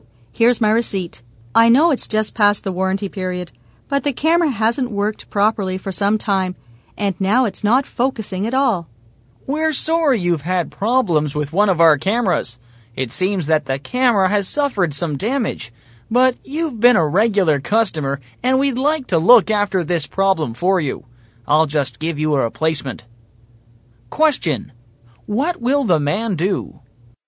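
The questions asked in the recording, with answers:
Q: what will the man do?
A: Give the customer a replacement camera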